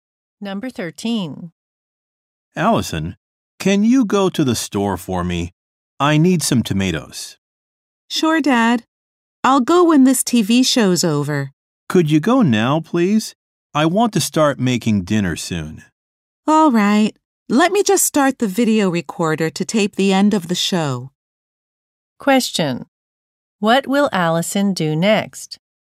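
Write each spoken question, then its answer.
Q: What will Allison do next?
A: Record the show and go to the store for tomatoes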